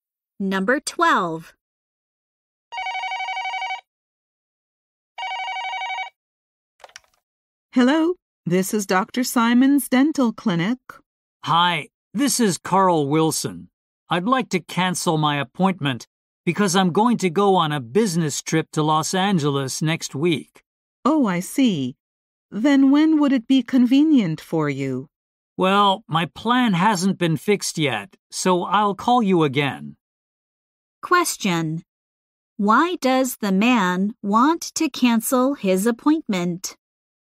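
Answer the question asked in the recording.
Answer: He is going on a business trip to Los Angeles.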